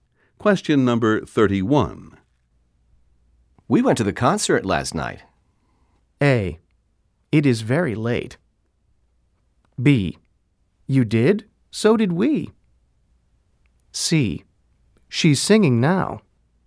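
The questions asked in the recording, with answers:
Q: We went to the concert last night.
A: B: You did? So did we.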